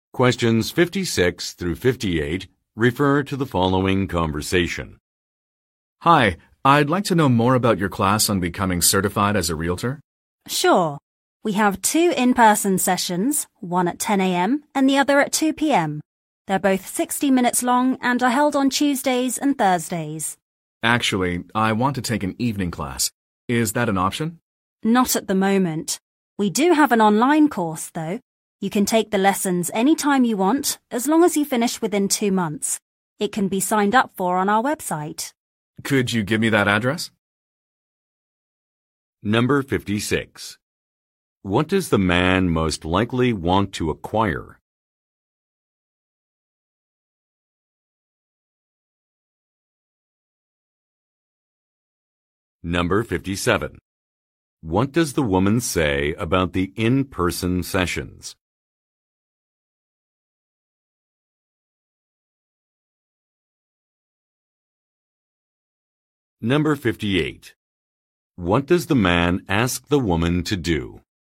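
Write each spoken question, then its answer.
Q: What does the man most likely want to acquire?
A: A realtor certification

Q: What does the man ask the woman to do?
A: Give him the website address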